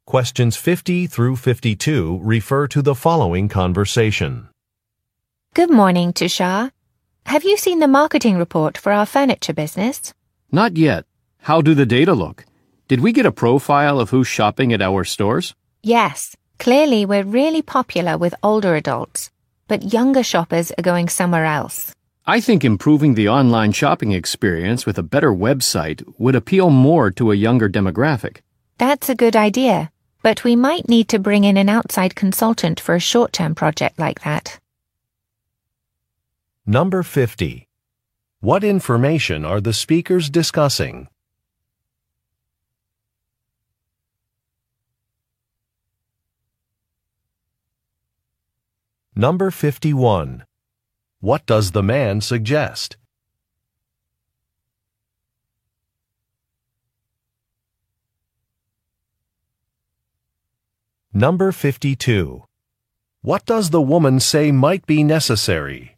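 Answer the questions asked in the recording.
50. A profile of who shops at their stores (customer demographics from the marketing report)
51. Improving the online shopping experience with a better website
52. Bringing in an outside consultant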